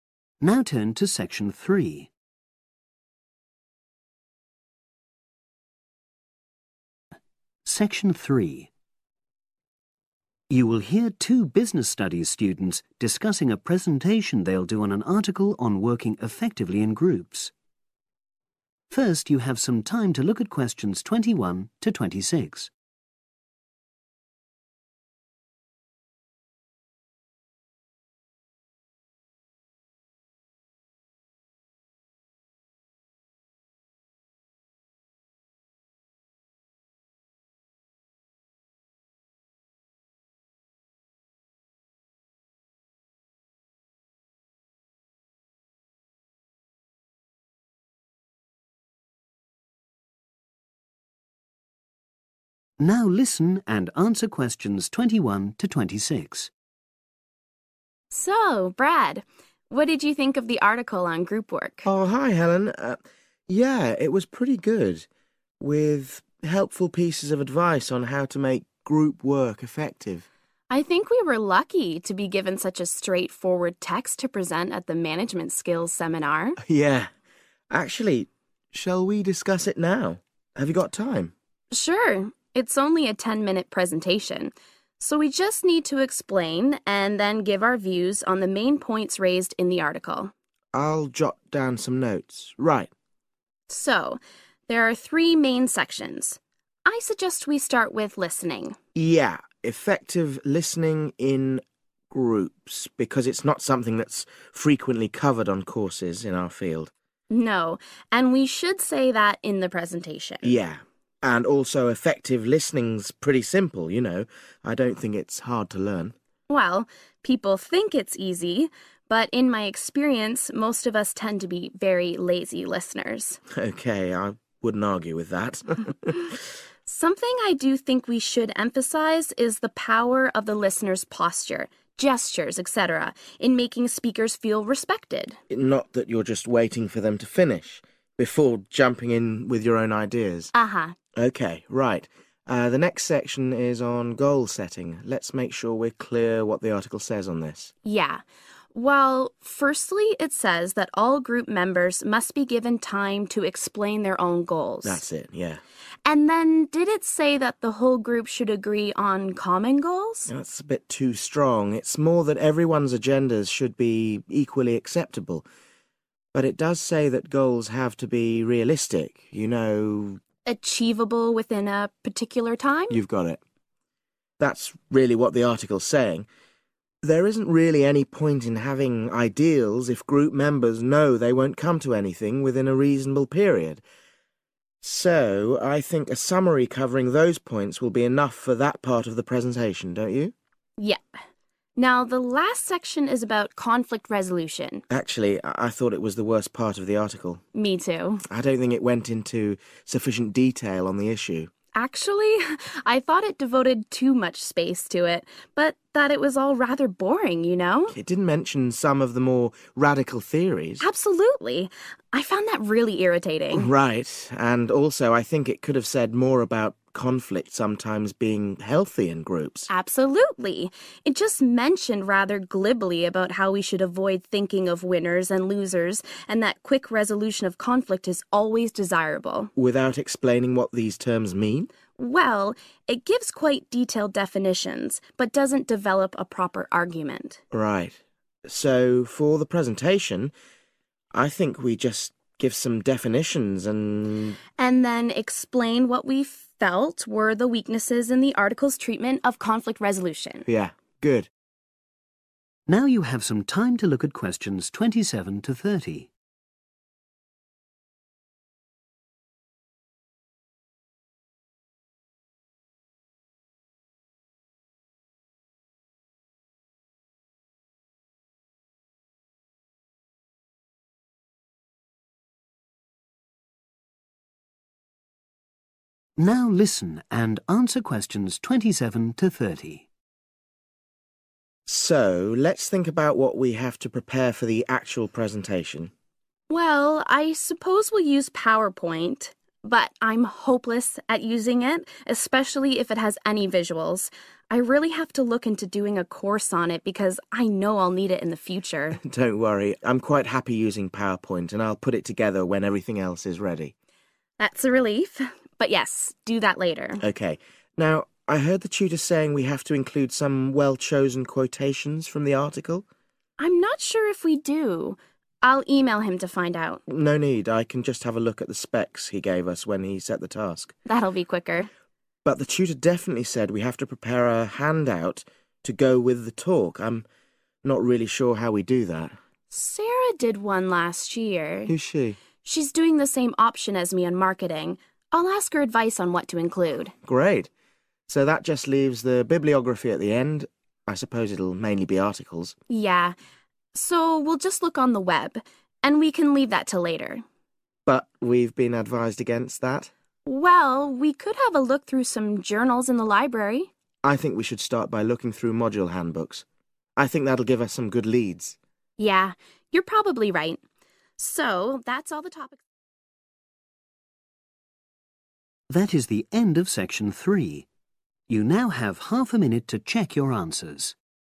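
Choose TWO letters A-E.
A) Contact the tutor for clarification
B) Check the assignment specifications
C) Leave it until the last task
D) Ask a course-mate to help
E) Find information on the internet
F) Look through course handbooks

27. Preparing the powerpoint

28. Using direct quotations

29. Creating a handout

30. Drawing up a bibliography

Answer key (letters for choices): 27C, 28B, 29D, 30F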